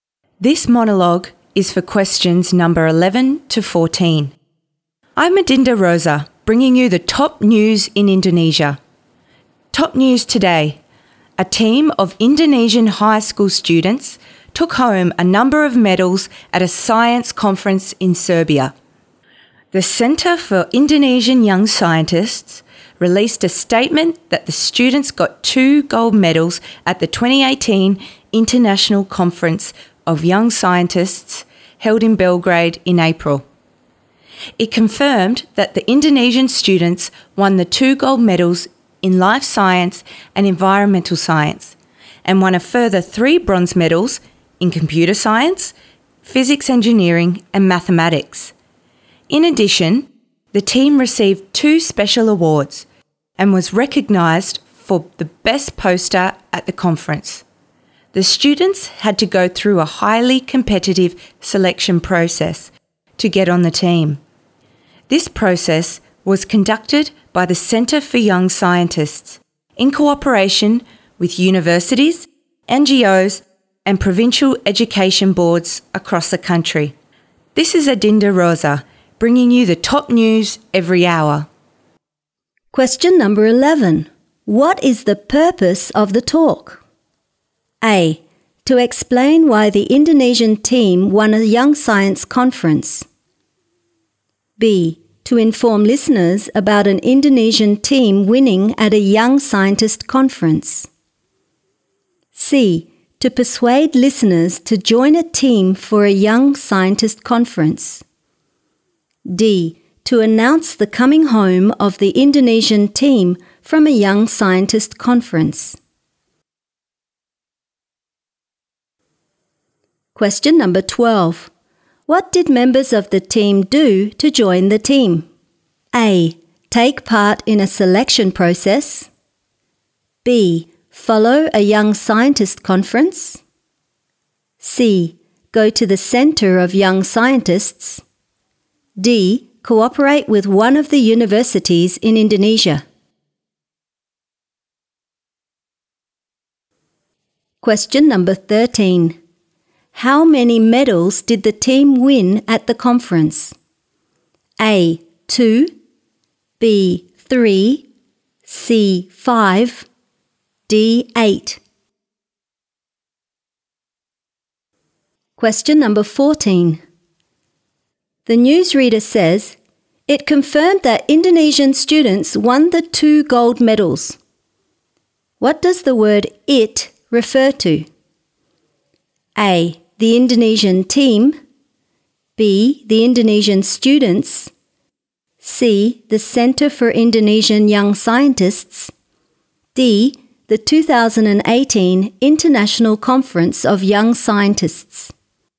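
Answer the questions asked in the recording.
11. B: To inform listeners about an Indonesian team winning at a Young Scientist Conference.
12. A: Take part in a selection process.
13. C: 5
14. C: The Center for Indonesian Young Scientists.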